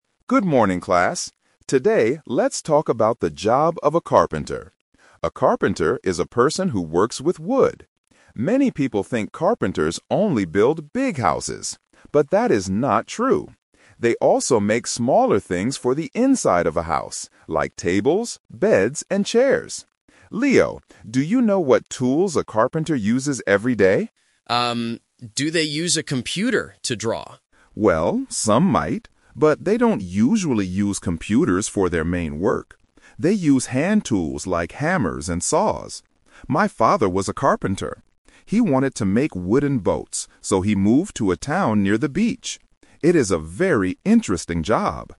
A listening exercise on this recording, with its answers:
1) What does a carpenter make?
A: Tables and chairs

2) What tool does a carpenter usually use for their main work?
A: A hammer

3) Why did Mr. Brown's father move to a town near the beach?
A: Because he wanted to make boats.

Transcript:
Brown: Good morning, class. Today, let's talk about the job of a carpenter. A carpenter is a person who works with wood. Many people think carpenters only build big houses. But that is not true. They also make smaller things for the inside of a house, like tables, beds, and chairs. Leo, do you know what tools a carpenter uses every day?
Leo: Um... do they use a computer to draw?
Brown: Well, some might, but they don't usually use computers for their main work. They use hand tools like hammers and saws. My father was a carpenter. He wanted to make wooden boats, so he moved to a town near the beach. It is a very interesting job!